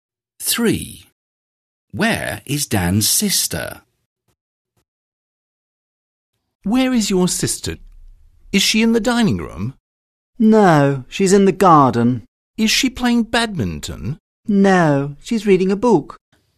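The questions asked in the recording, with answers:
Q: Where is Dan's sister?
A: In the garden, reading a book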